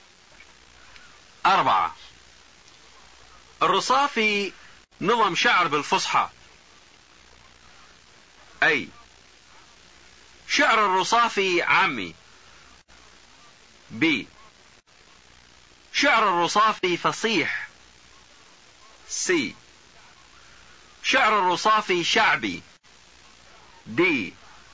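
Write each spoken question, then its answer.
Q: أربعة. الرصافي نظم شعر بالفصحى.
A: B: شعر الرصافي فصيح.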